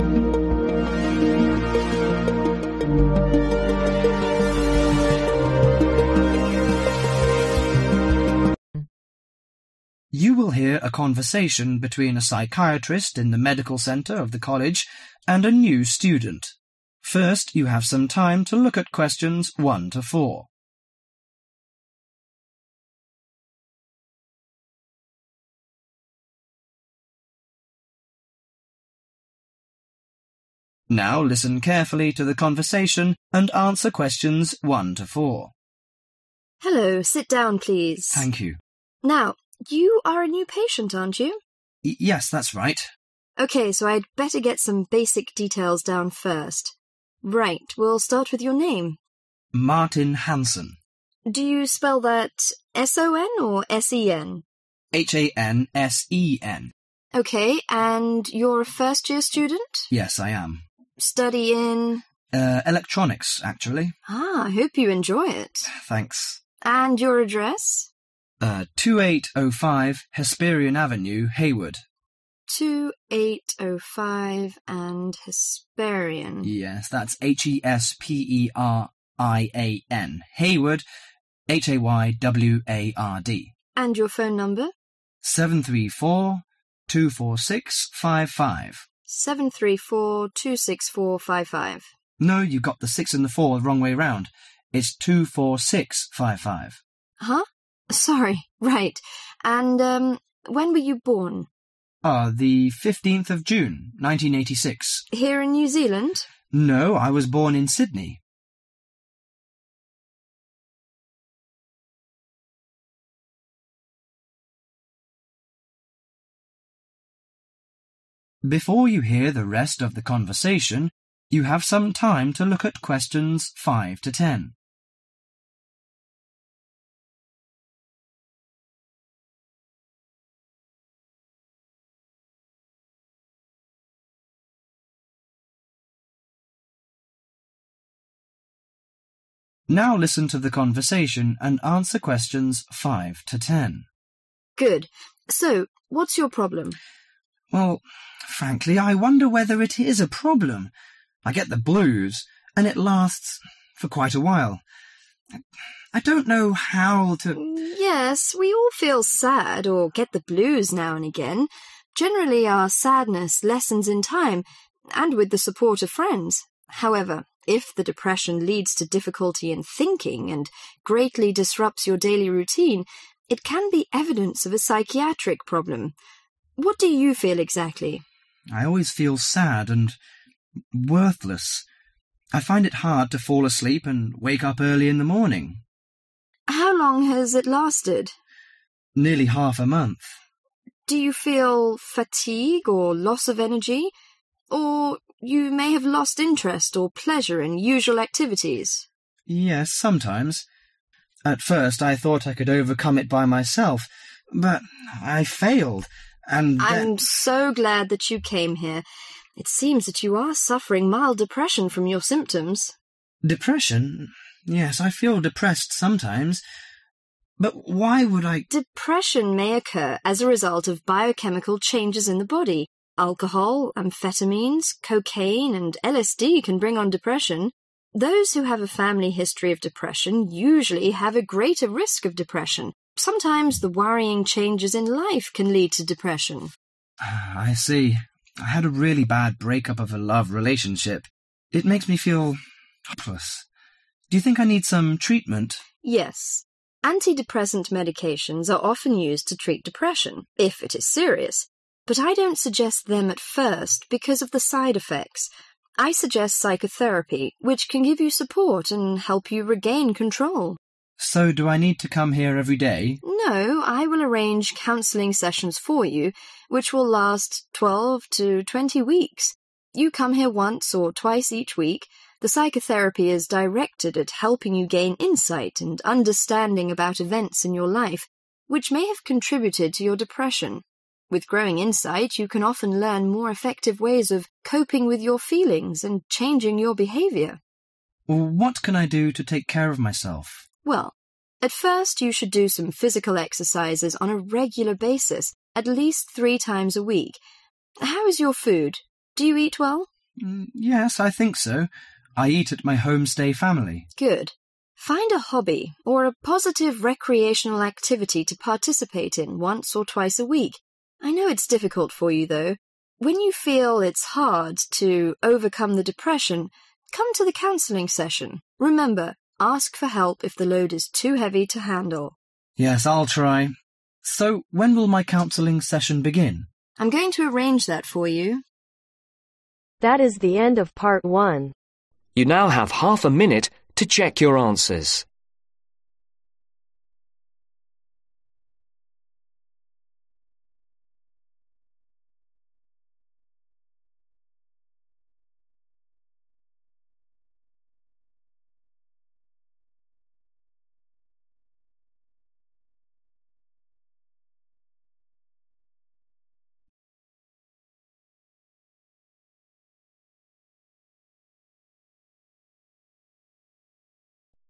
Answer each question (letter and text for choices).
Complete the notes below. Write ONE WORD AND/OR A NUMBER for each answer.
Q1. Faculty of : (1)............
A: Electronics

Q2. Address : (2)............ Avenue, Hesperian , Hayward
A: 2805

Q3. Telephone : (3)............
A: 73424655

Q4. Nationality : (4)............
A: Australian

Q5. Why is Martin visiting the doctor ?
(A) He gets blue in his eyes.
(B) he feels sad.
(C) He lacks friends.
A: (B) he feels sad.

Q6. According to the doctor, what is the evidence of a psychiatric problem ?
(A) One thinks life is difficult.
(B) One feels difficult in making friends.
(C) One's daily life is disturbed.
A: (C) One's daily life is disturbed.

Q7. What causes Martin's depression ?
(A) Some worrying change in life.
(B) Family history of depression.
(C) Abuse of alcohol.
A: (A) Some worrying change in life.

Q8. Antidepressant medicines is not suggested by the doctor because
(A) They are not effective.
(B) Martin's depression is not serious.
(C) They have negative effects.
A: (C) They have negative effects.